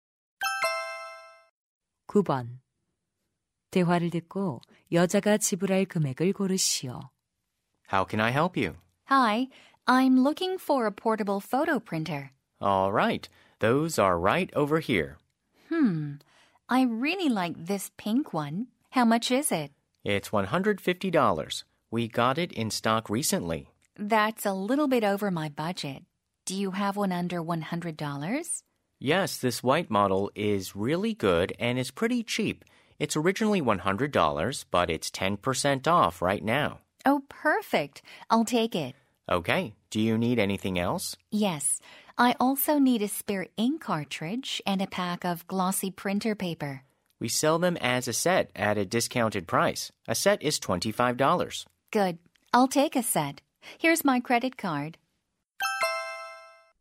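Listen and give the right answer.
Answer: $115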